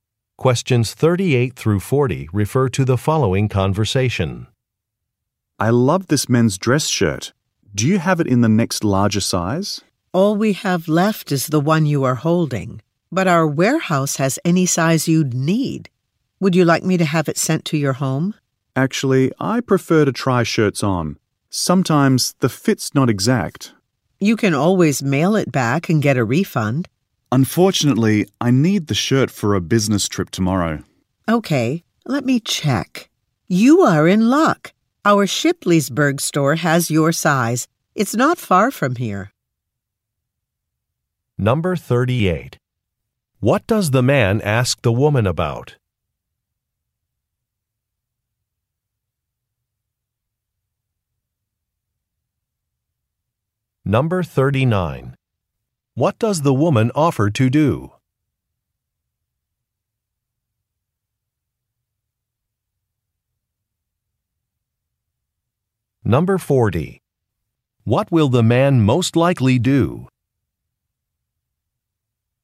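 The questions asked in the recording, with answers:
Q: What does the man ask the woman about?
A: A larger size of a shirt

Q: What does the woman offer to do?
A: Have the shirt sent to his home

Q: What will the man most likely do?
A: Go to the Shipleysburg store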